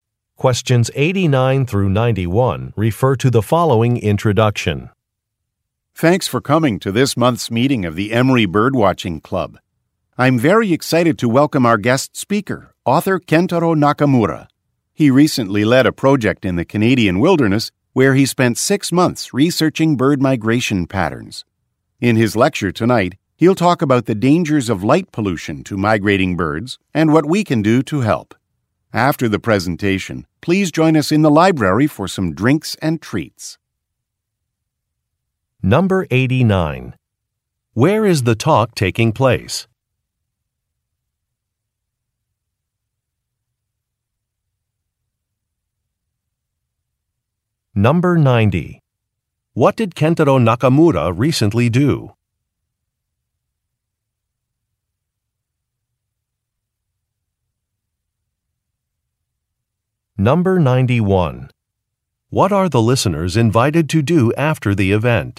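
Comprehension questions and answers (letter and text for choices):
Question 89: Where is the talk taking place?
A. At an awards ceremony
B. At an exhibit opening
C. At a club meeting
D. At a national park tour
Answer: C. At a club meeting

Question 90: What did Kentaro Nakamura recently do?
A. He published a book.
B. He started a conservation society.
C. He won a photography contest.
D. He conducted a research project.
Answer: D. He conducted a research project.

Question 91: What are the listeners invited to do after the event?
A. Enjoy some refreshments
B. Sign up to volunteer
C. Purchase some souvenirs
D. Take some maps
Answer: A. Enjoy some refreshments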